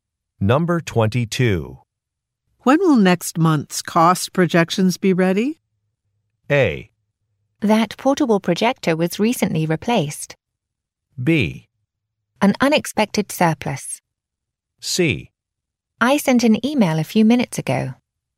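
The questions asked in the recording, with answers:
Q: When will next month's cost projections be ready?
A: C: I sent an email a few minutes ago.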